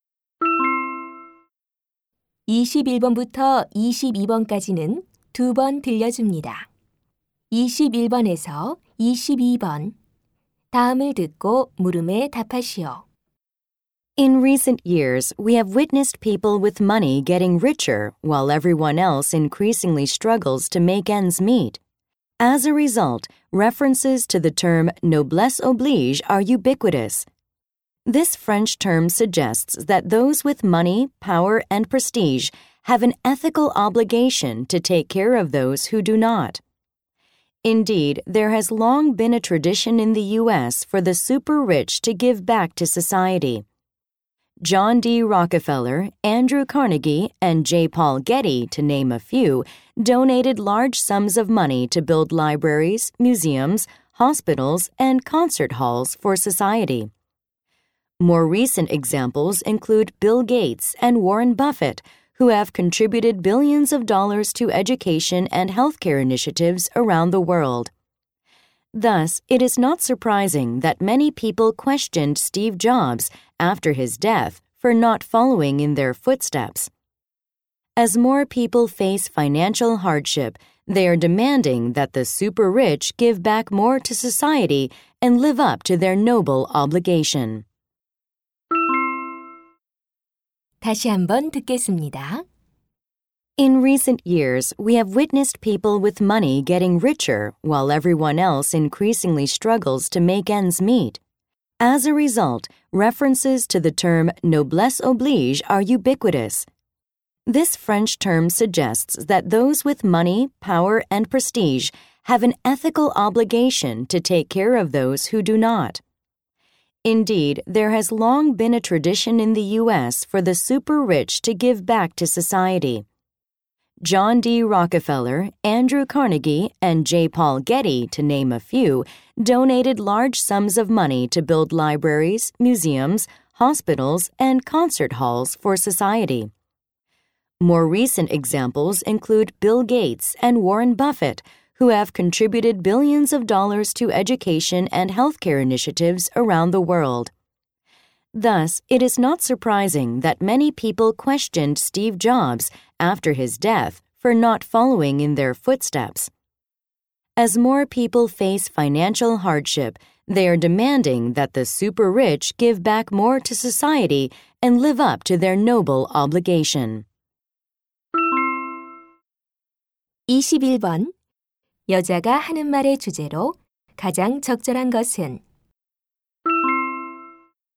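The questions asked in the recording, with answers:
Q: 여자가 하는 말의 주제로 가장 적절한 것은?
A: 부자들의 사회 환원 의무(노블레스 오블리주)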